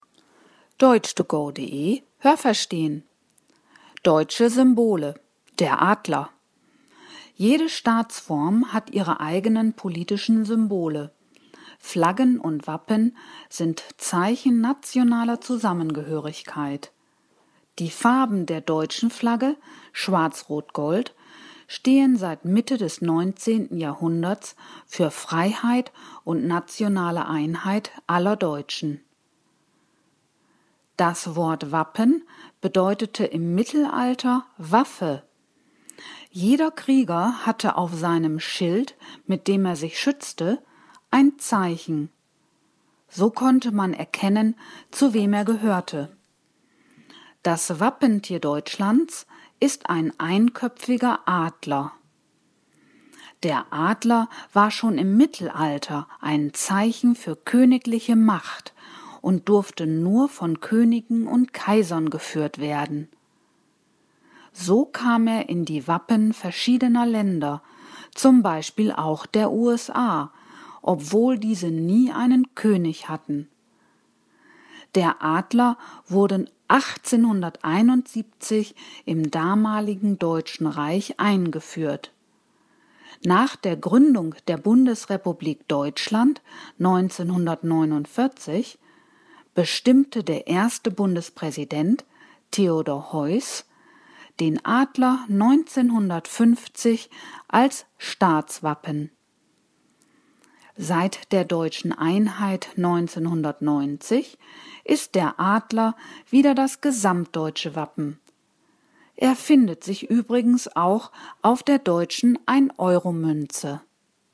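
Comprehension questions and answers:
Welche Präposition passt?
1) Die Farben der deutschen Flagge stehen _____ Mitte des 19. Jahrhunderts für Freiheit und nationale Einheit aller Deutschen.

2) Jeder Krieger hatte _____ seinem Schild ein Zeichen.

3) Der Adler war ein Zeichen _____ königliche Macht.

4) So kam der Adler _____ die Wappen verschiedener Länder.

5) Der Adler findet sich auch _____ der 1-Euro-Münze.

Haben Sie das gehört? Stimmt diese Aussage?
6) Flaggen und Wappen sind Zeichen nationaler Stärke.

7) Die Farben der deutschen Flagge sind Schwarz-Rot-Gold.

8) Das Wort Wappen bedeutete im Mittelalter „Schild".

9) Der Adler war im Mittelalter ein Zeichen der Macht und wurde von Kriegern auf ihren Schilden geführt.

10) 1871 wurde der Adler im damaligen Deutschen Reich als Wappen eingeführt.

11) Als Staatswappen der Bundesrepublik Deutschland wurde der Adler 1949 bestimmt.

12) Der Adler ist seit der deutschen Wiedervereinigung 1990 das gesamtdeutsche Wappen.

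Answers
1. seit
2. auf
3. für
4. in
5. auf
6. falsch
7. richtig
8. falsch
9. falsch
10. richtig
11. falsch
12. richtig

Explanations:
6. Sie sind Zeichen der nationalen Zusammengehörigkeit.
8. Es bedeutete „Waffe".
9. Zu der Zeit durften nur Könige und Kaiser den Adler führen.
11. Das war 1950 (durch den Bundespräsidenten Theodor Heuss).

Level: B (mittel)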